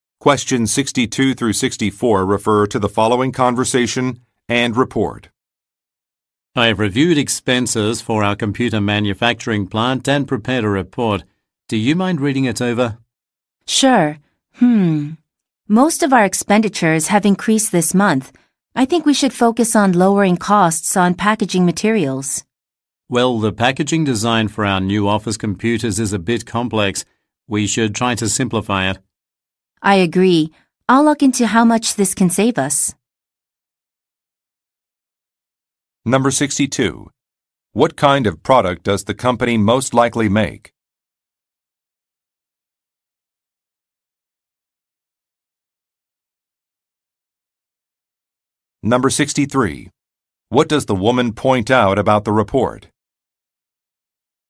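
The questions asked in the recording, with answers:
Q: What kind of product does the company most likely make?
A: Computers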